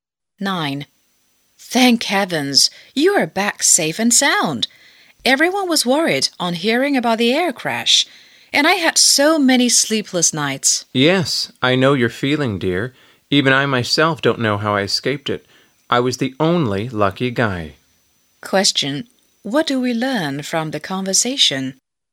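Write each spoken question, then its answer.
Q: What do we learn from the conversation?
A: The man was the only survivor of the air crash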